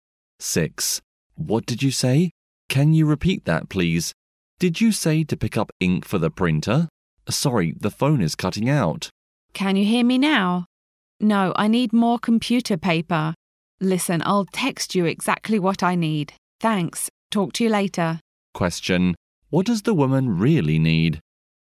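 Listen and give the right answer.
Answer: More computer paper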